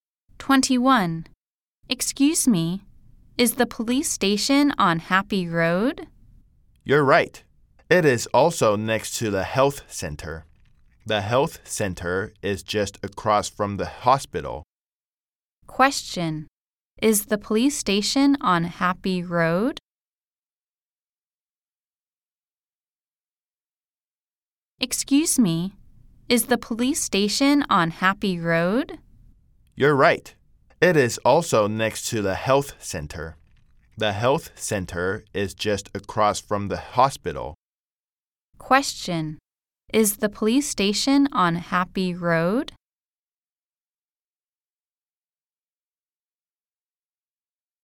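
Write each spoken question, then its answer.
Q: Is the police station on Happy Road?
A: Yes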